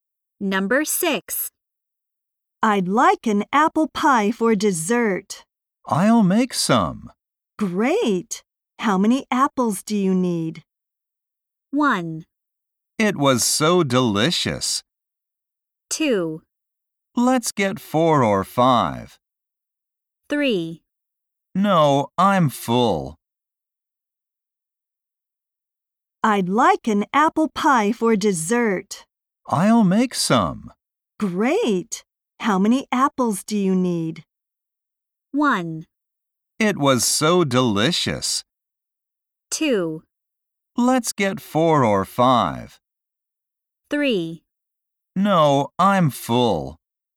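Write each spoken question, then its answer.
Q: Great. How many apples do you need?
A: 2: Let's get 4 or 5.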